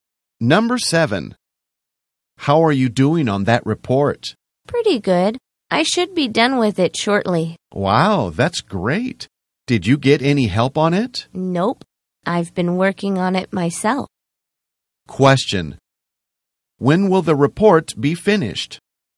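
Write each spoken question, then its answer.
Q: When will the report be finished?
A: Shortly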